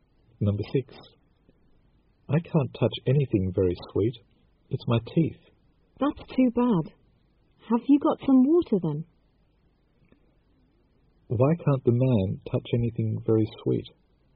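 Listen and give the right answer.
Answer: Because of trouble with his teeth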